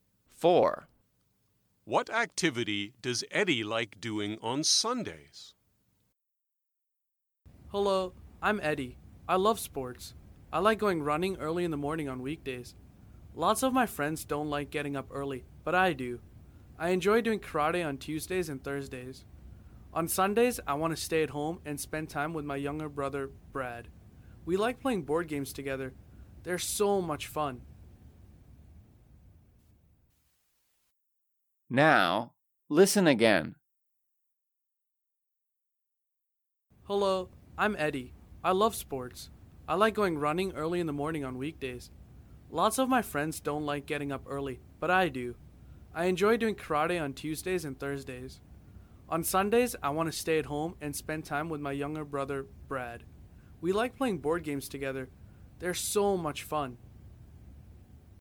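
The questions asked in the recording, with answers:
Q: What activity does Eddie like doing on Sundays?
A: playing board games with his brother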